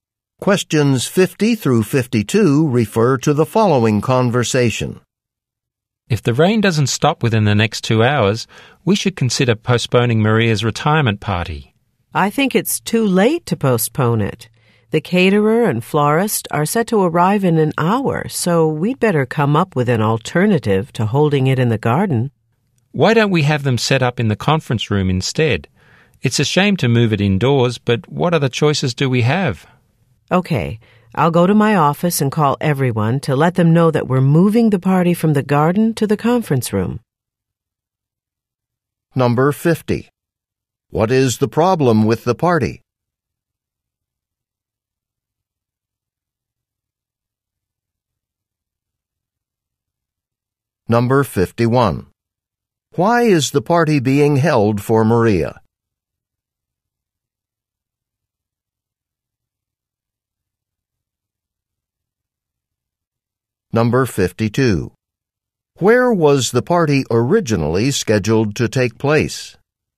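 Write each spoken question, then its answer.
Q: What is the problem with the party?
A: It is raining

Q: Why is the party being held for Maria?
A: She is retiring

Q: Where was the party originally scheduled to take place?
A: In the garden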